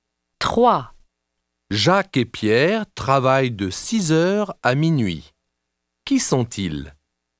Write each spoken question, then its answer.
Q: Qui sont-ils?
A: Ce sont des serveurs.